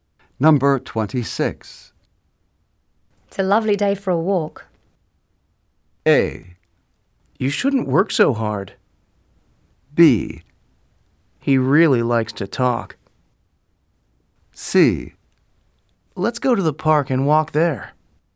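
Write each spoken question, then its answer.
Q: It's a lovely day for a walk.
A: C: Let's go to the park and walk there.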